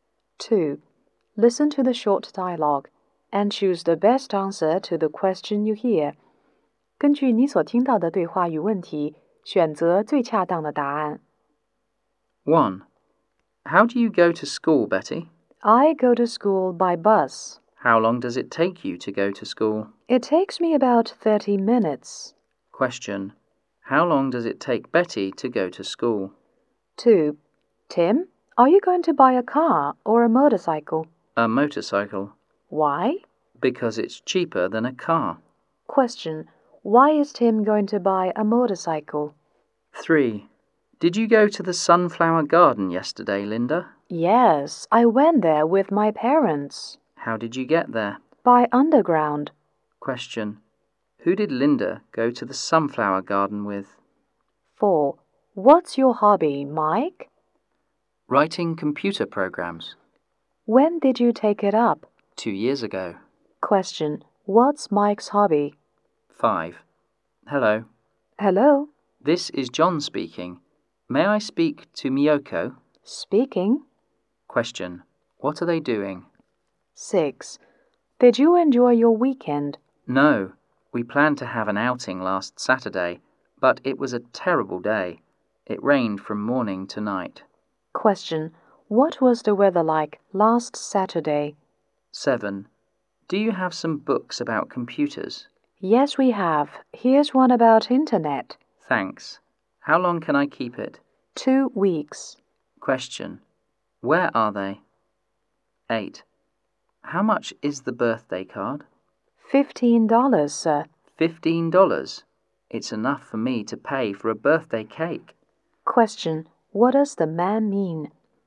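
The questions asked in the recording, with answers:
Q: How long does it take Betty to go to school?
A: About 30 minutes

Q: Question. Why is Tim going to buy a motorcycle?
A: It's cheaper than a car

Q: Question. Who did Linda go to the sunflower garden with?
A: Her parents

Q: Question. What's Mike's hobby?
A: Writing computer programs

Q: Question. What are they doing?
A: Talking on the phone

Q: Question. What was the weather like last Saturday?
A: Rainy

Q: Question. Where are they?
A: In a library

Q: Question. What does the man mean?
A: The card is too expensive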